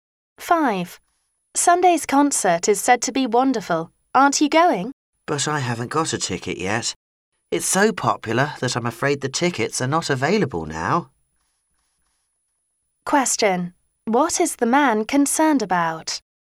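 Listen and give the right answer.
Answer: That the concert tickets are no longer available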